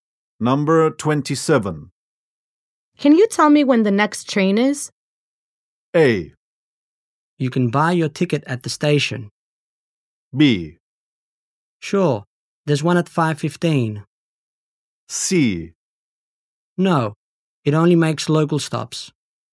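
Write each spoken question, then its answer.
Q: Can you tell me when the next train is?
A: B: Sure, there's one at 5:15.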